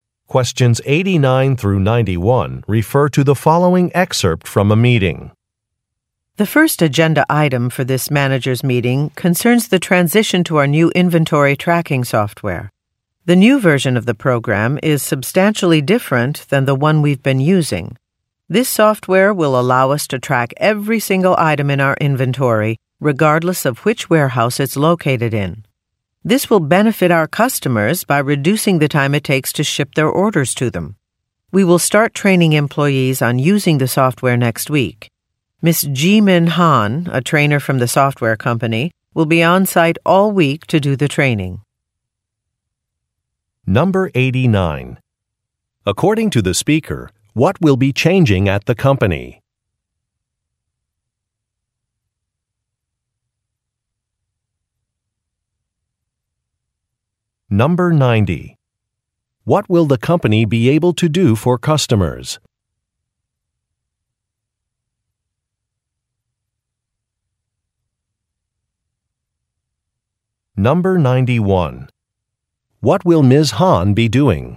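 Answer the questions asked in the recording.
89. Its inventory tracking software
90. Ship their orders faster
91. Training employees on the new software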